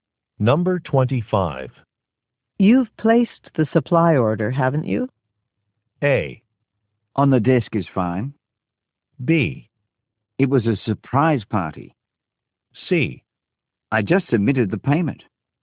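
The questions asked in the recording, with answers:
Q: You've placed the supply order, haven't you?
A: C: I just submitted the payment.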